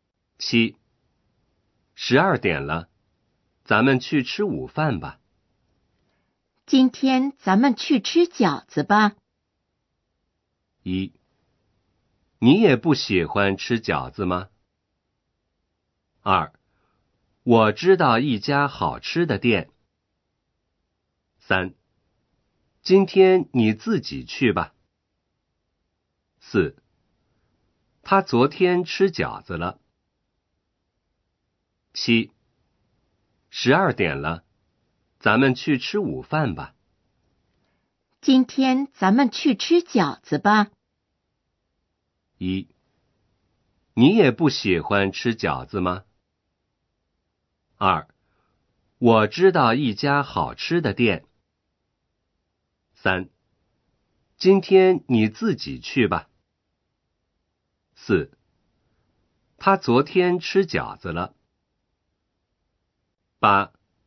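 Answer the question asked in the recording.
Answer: 2: 我知道一家好吃的店。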